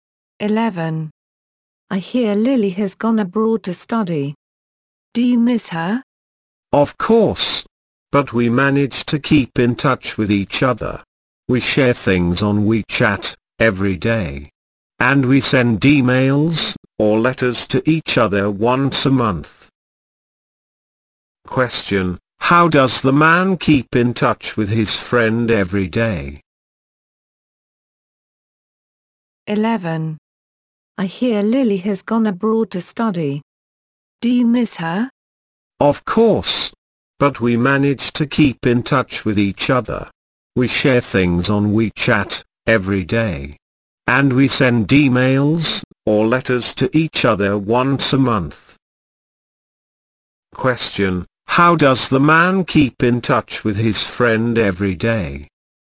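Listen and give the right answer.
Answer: By sharing things on WeChat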